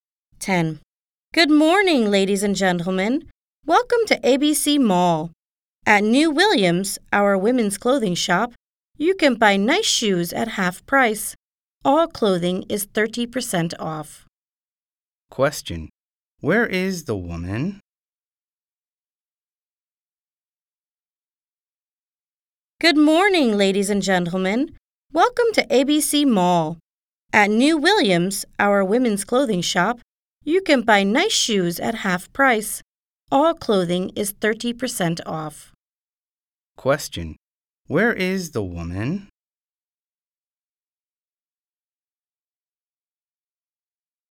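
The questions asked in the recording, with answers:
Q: Where is the woman?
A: At ABC Mall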